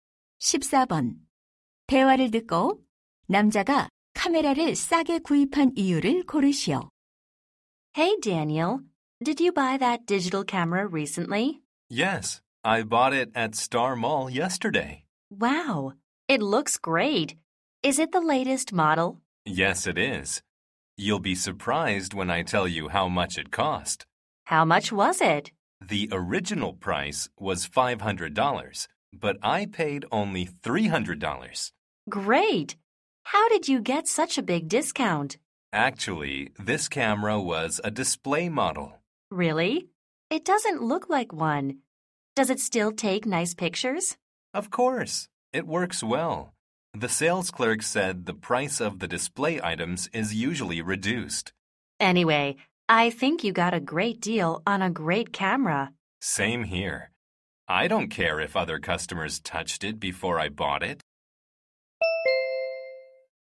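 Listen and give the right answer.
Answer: 전시 상품이어서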